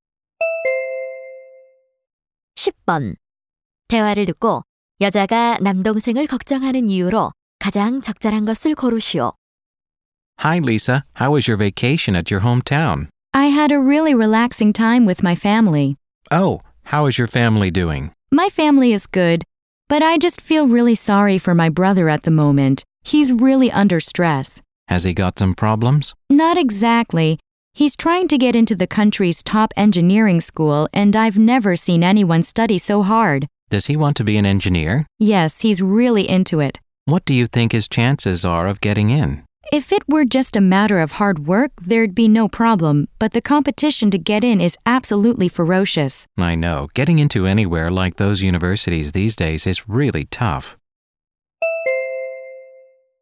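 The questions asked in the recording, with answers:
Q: 대화를 듣고 여자가 남동생을 걱정하는 이유로 가장 적절한 것을 고르시오.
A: 일류 공대 입학 경쟁이 매우 치열해서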